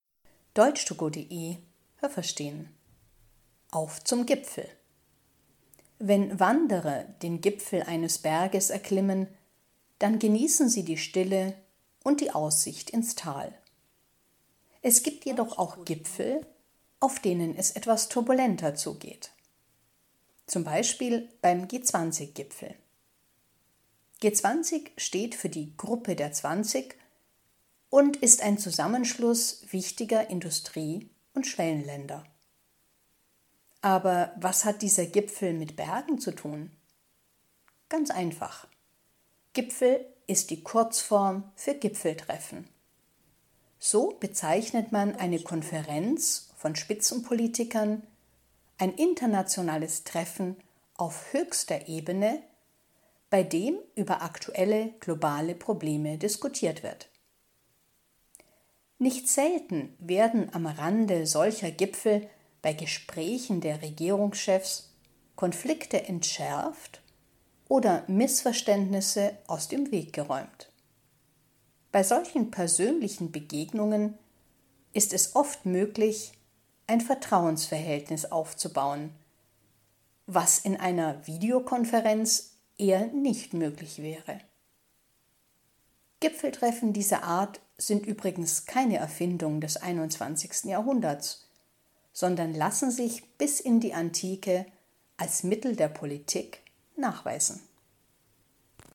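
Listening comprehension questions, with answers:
Haben Sie das gehört? Stimmt diese Aussage?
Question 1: Auf einem Berggipfel kann man das Panorama genießen.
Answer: Richtig

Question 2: Bei einem Gipfeltreffen diskutieren internationale Politiker auf höchster Ebene.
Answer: Richtig

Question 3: Gespräche am Rande des Gipfels führen oft zu Konflikten und Missverständnissen.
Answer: Falsch

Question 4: In einer Videokonferenz könnte man genauso gut ein Vertrauensverhältnis aufbauen wie bei einer persönlichen Begegnung.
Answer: Falsch

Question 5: Gipfeltreffen gab es schon in der Antike, aber nicht als Mittel der Politik.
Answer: Falsch

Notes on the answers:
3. Laut Text werden bei diesen persönlichen Gesprächen oft Konflikte entschärft und Missverständnisse beseitigt.
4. Laut Text wird das bezweifelt.
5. Sie waren auch in der Antike schon ein Mittel der Politik.

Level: B (mittel)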